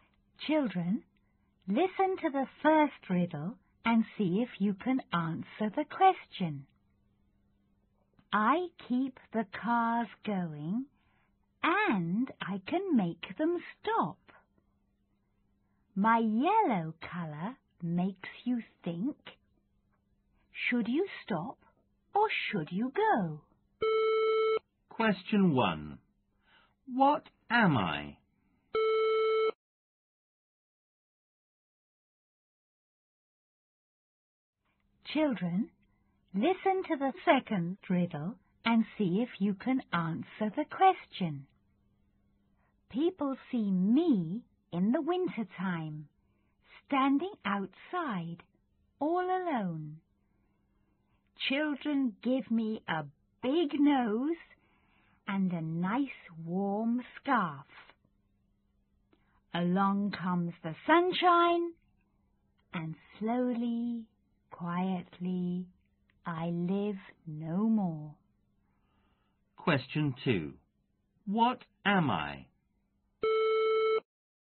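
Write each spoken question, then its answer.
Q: What am I?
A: a traffic light

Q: What am I?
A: a snowman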